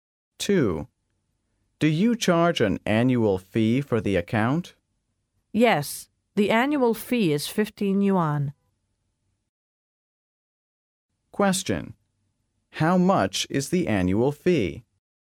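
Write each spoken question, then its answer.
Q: How much is the annual fee?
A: 15 yuan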